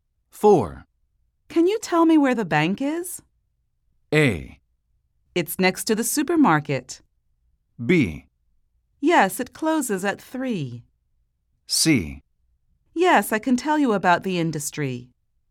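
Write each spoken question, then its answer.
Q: Can you tell me where the bank is?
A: A: It's next to the supermarket.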